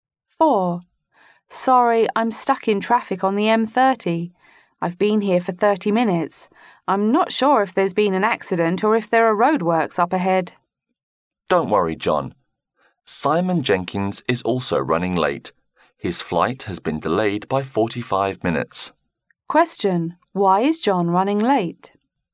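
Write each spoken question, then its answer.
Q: Why is John running late?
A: He is stuck in traffic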